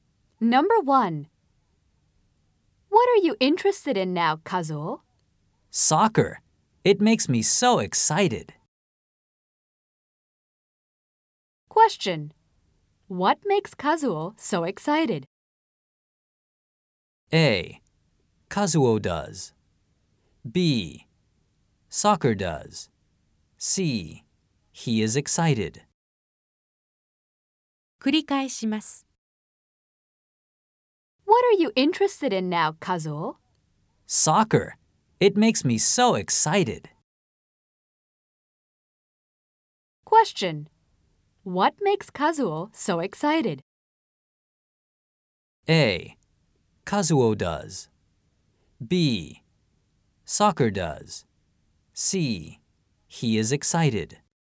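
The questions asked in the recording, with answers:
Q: What makes Kazuo so excited?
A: B: Soccer does.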